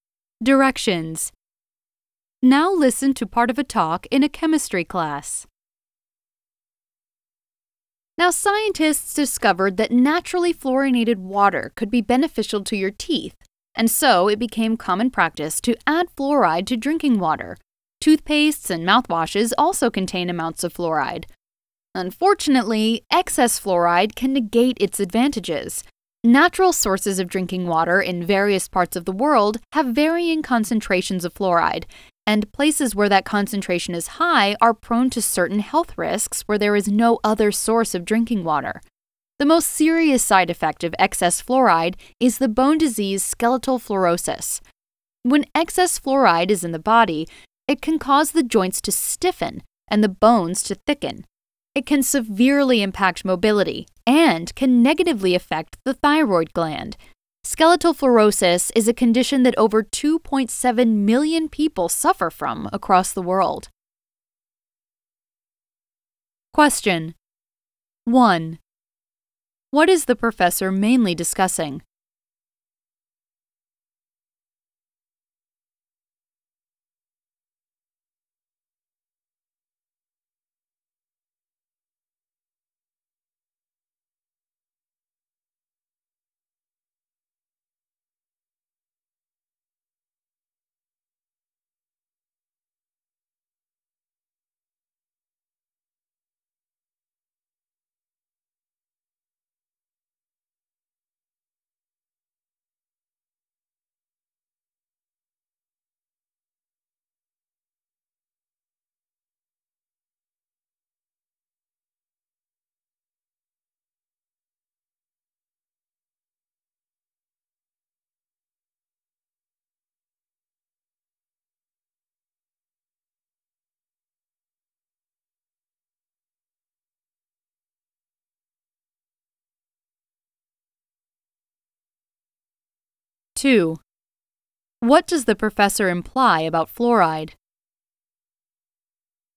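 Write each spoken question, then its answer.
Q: What is the professor mainly discussing?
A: The health risks of too much fluoride, especially skeletal fluorosis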